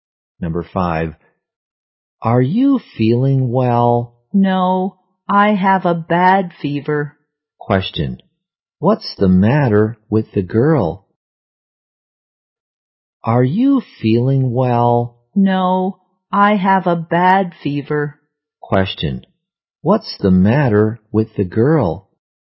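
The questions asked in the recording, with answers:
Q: What's the matter with the girl?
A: She has a bad fever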